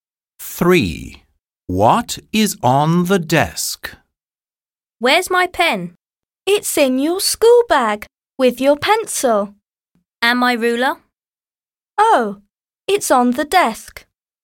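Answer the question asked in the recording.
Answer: The ruler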